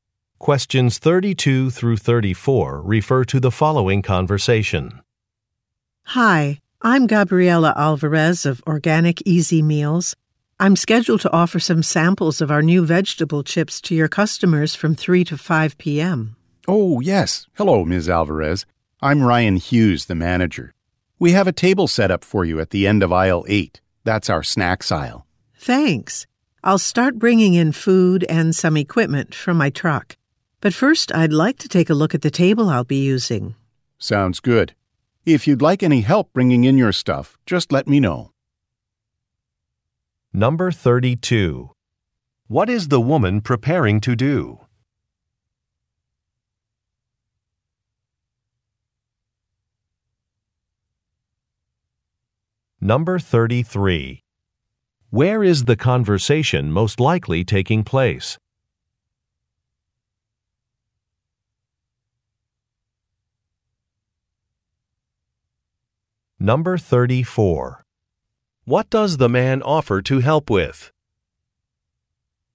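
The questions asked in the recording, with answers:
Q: What is the woman preparing to do?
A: Offer samples of new vegetable chips to customers

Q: Where is the conversation most likely taking place?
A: At a grocery store

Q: What does the man offer to help with?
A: Bringing in her food and equipment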